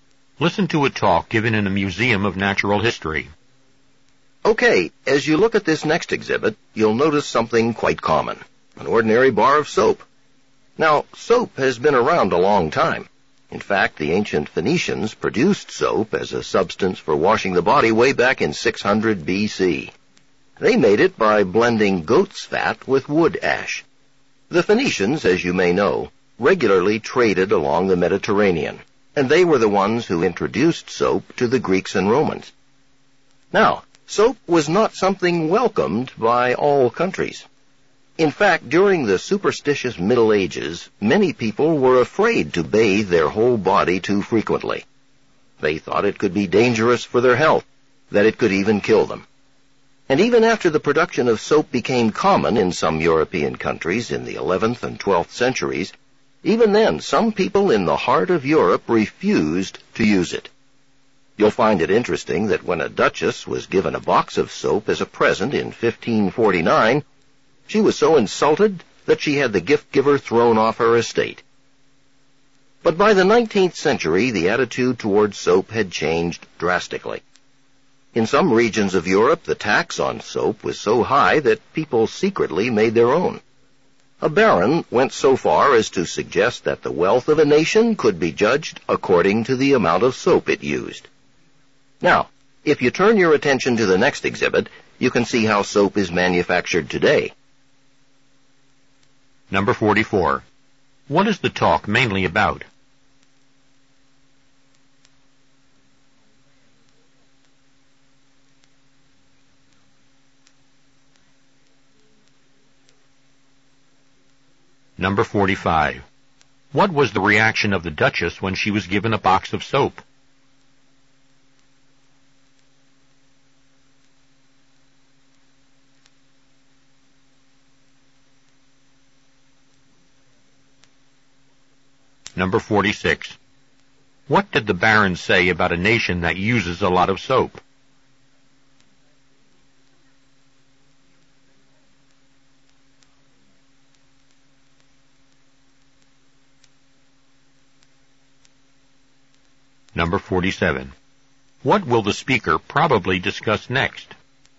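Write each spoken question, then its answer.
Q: What is the talk mainly about?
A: The history of soap

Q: What was the reaction of the Duchess when she was given a box of soap?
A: She was insulted and had the gift-giver thrown off her estate

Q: What did the Baron say about a nation that uses a lot of soap?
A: It is wealthy; a nation's wealth can be judged by the soap it uses

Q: What will the speaker probably discuss next?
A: How soap is manufactured today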